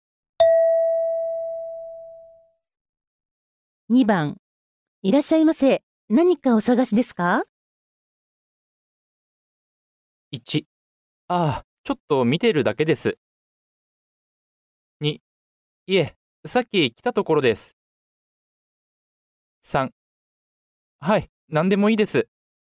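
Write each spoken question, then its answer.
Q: いらっしゃいませ。何かお探しですか?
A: 1: ああ、ちょっと見てるだけです。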